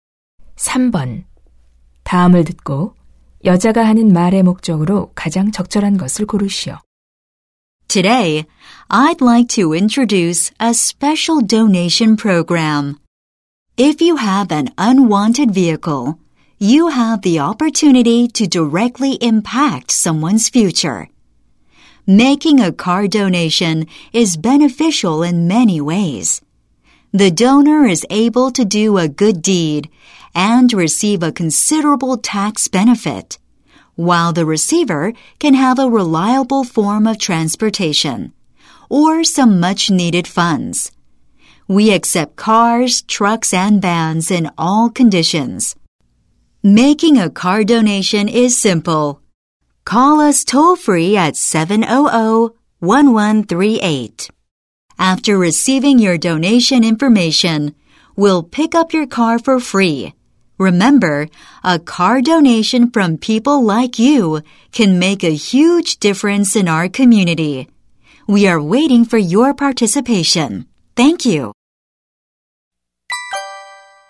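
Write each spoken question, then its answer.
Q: 다음을 듣고 여자가 하는 말의 목적으로 가장 적절한 것을 고르시오.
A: 자동차 기부 프로그램 참여를 권장하려고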